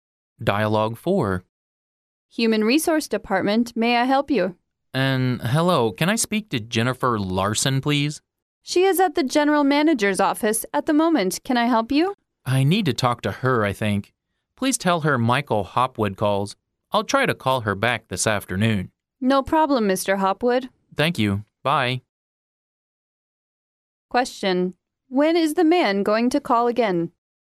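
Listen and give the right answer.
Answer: This afternoon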